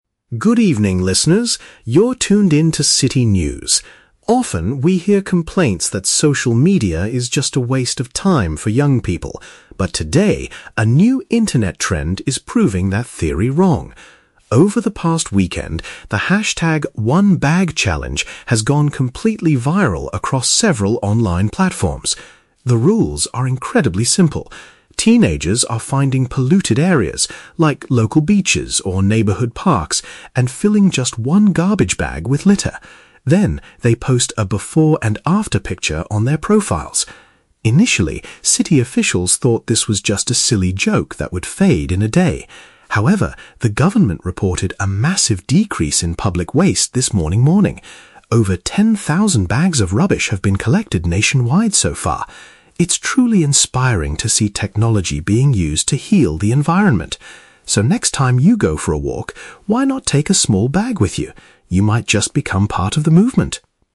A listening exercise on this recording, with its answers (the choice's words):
Listen to a news anchor talking about a recent social media trend. For each question, choose the correct answer (A, B, or C).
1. What is the main activity of the new internet trend?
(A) Taking beautiful photographs of neighborhood parks.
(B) Removing trash from polluted outdoor public areas.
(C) Raising money for local environmental organizations.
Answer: Removing trash from polluted outdoor public areas.

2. What did the city officials originally think about this challenge?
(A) They believed that it would not last very long.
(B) They were worried that it was too dangerous for teenagers.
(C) They were angry because students were making a mess.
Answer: They believed that it would not last very long.

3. What does the news anchor suggest the listeners do at the end of the broadcast?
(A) Stop wasting so much time looking at social media.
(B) Share this news report with their friends online.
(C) Bring an item to pick up waste during a stroll.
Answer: Bring an item to pick up waste during a stroll.

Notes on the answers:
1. The anchor says teenagers are "filling just one garbage bag with litter," which means removing trash from polluted areas. Option (A) is a trap; the words "parks" and "picture" are mentioned, but the goal isn't just taking beautiful photos of parks, it's taking "before and after" pictures of the cleaned garbage. Option (C) is a trap; it is a good environmental action, but raising money is never mentioned.
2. The anchor states that officials thought it was a joke that "would fade in a day," which means they believed it would not last very long. Option (B) is not mentioned. Option (C) is a trap; the word "teenagers" is used, but they are cleaning up, not making a mess.
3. At the end, the anchor says, "next time you go for a walk (during a stroll), why not take a small bag with you?" (bring an item to pick up waste). Option (A) is a trap; "waste of time" is mentioned at the very beginning as a common complaint, not as the final advice. Option (B) is a trap; sharing online is a common social media action, but the anchor does not ask the listeners to do this.

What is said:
News Anchor: Good evening, listeners. You're tuned in to City News. Often, we hear complaints that social media is just a waste of time for young people. But today, a new internet trend is proving that theory wrong. Over the past weekend, the hashtag "One Bag Challenge" has gone completely viral across several online platforms. The rules are incredibly simple. Teenagers are finding polluted areas—like local beaches or neighborhood parks—and filling just one garbage bag with litter. Then, they post a "before and after" picture on their profiles. Initially, city officials thought this was just a silly joke that would fade in a day. However, the government reported a massive decrease in public waste this Monday morning. Over ten thousand bags of rubbish have been collected nationwide so far. It's truly inspiring to see technology being used to heal the environment. So, next time you go for a walk, why not take a small bag with you? You might just become part of the movement.